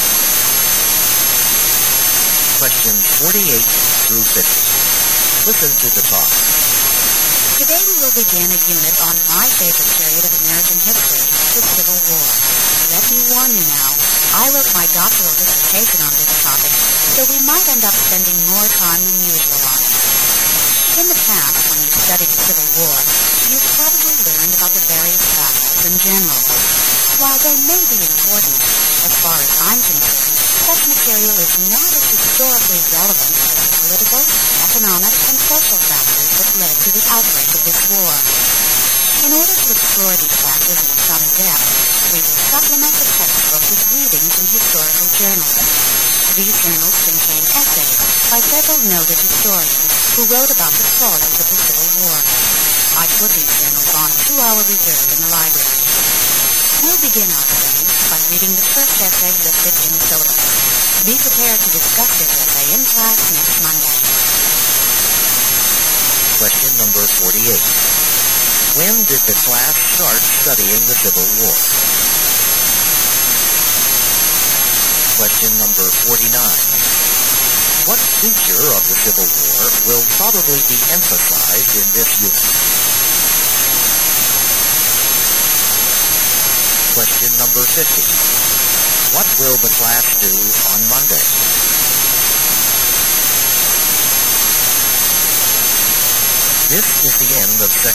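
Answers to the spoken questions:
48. Today
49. Its political, economic and social causes
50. Discuss the first essay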